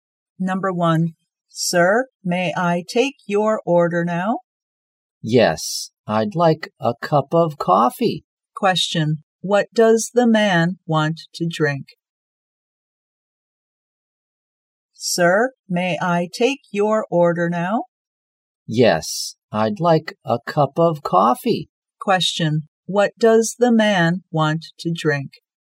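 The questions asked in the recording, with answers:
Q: Question, what does the man want to drink?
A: Coffee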